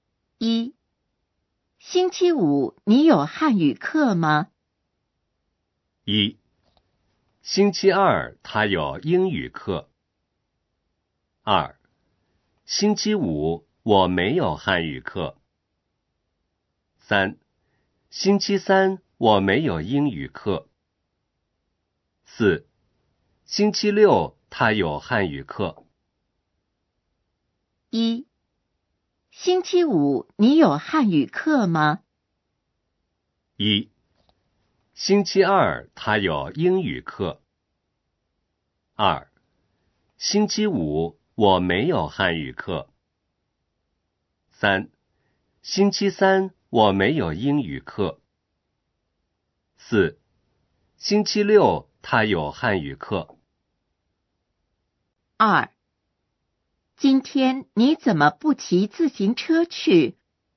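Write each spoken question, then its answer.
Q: 星期五、你有汉语课吗?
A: 2: 星期五,我没有汉语课。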